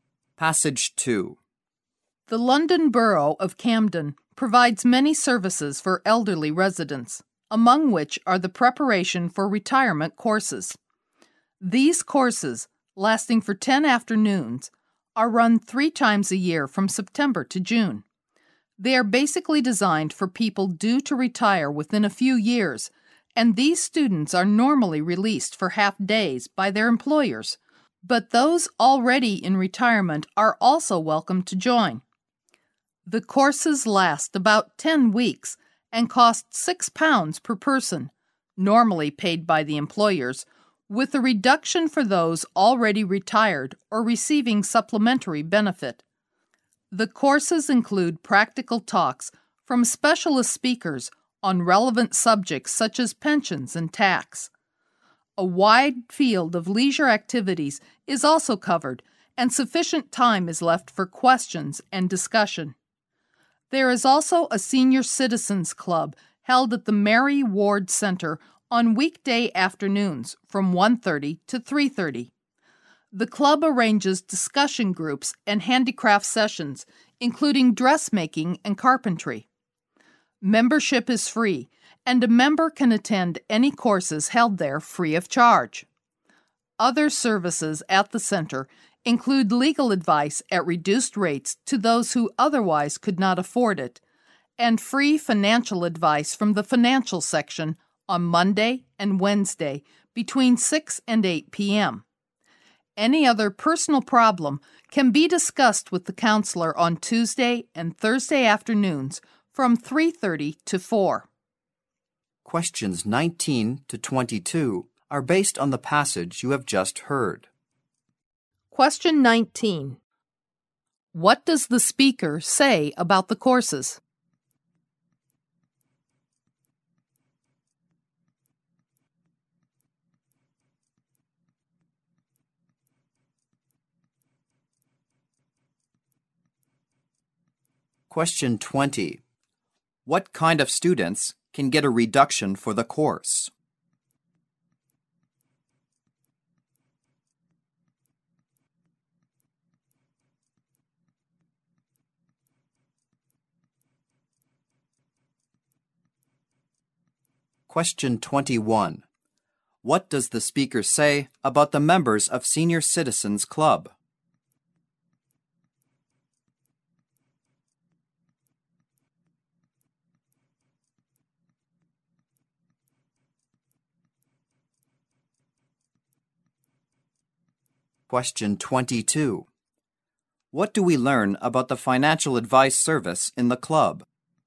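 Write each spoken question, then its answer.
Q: What kind of students can get a reduction for the course?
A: Those already retired or receiving supplementary benefit.

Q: What does the speaker say about the members of Senior Citizens Club?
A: Membership is free and members can attend any courses there free of charge.

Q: What do we learn about the financial advice service in the club?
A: It is free, on Monday and Wednesday from 6 to 8 p.m.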